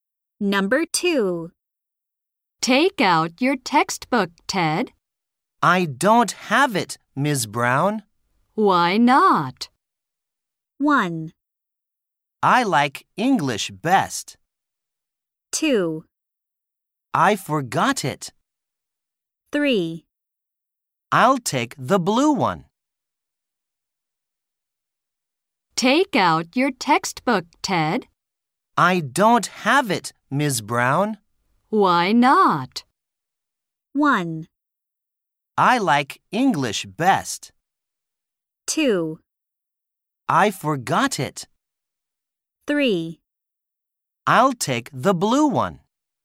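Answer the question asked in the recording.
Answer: 2: I forgot it.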